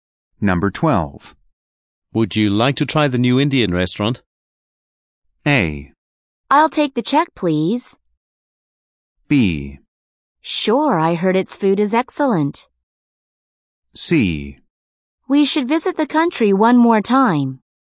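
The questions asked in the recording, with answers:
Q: Would you like to try the new Indian restaurant?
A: B: Sure, I heard its food is excellent.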